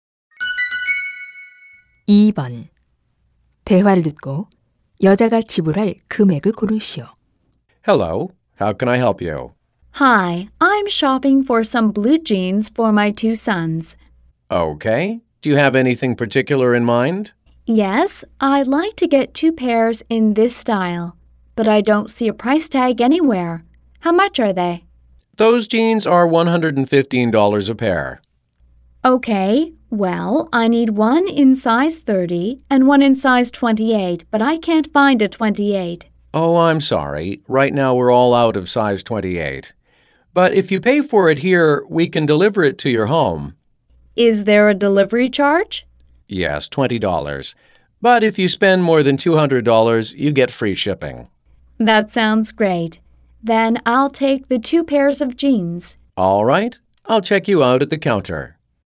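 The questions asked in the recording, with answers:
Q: 대화를 듣고 여자가 지불할 금액을 고르시오.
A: $230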